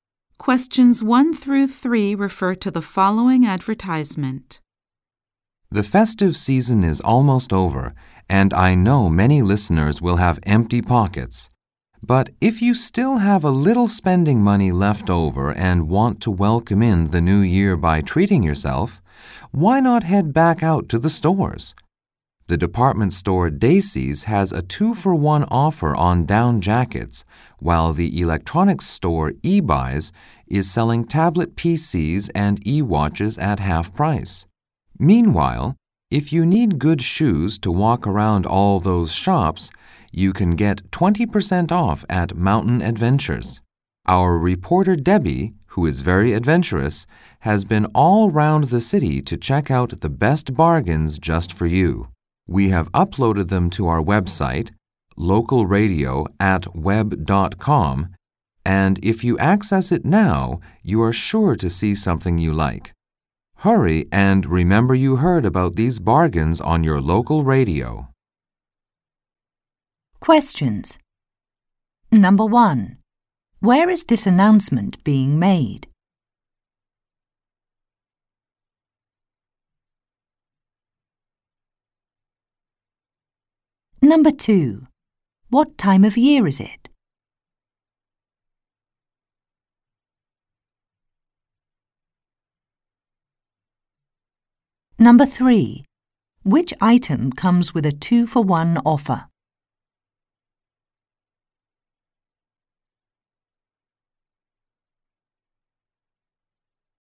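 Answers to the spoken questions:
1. On the local radio
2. The end of the festive season, just before the new year
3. Down jackets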